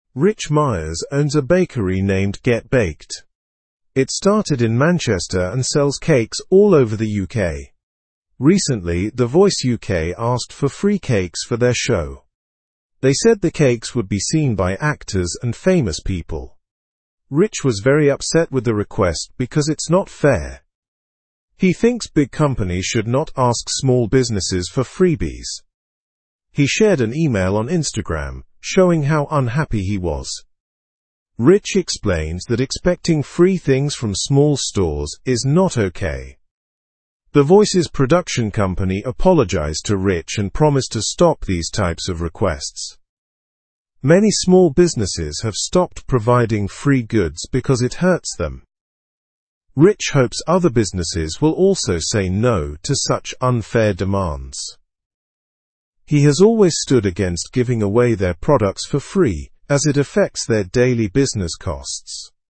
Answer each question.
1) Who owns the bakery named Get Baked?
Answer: Rich Myers owns the bakery named Get Baked.

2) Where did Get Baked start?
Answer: Get Baked started in Manchester.

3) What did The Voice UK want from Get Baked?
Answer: The Voice UK wanted free cakes from Get Baked.

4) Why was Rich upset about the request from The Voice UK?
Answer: Rich was upset because he thought it was unfair for big companies to ask small businesses for free items.

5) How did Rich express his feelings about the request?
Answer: Rich shared his feelings by posting an email on Instagram.

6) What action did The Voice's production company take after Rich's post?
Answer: The production company apologized to Rich and promised to stop such requests.

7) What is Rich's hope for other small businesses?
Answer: Rich hopes other small businesses will say no to unfair demands like his.

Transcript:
Rich Myers owns a bakery named Get Baked. It started in Manchester and sells cakes all over the UK. Recently, The Voice UK asked for free cakes for their show. They said the cakes would be seen by actors and famous people.
Rich was very upset with the request because it's not fair. He thinks big companies should not ask small businesses for freebies. He shared an email on Instagram, showing how unhappy he was. Rich explained that expecting free things from small stores is not okay.
The Voice's production company apologized to Rich and promised to stop these types of requests. Many small businesses have stopped providing free goods because it hurts them. Rich hopes other businesses will also say no to such unfair demands. He has always stood against giving away their products for free, as it affects their daily business costs.

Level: Level 2